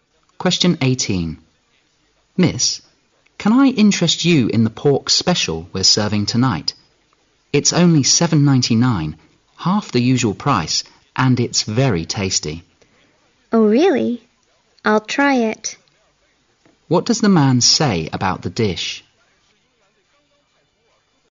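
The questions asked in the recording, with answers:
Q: What does the man say about the dish?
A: It's half the usual price ($7.99) and very tasty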